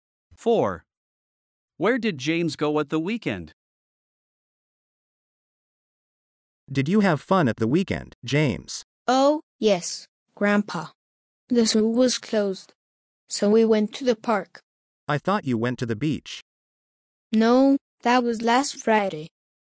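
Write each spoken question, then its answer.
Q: Where did James go at the weekend?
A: To the park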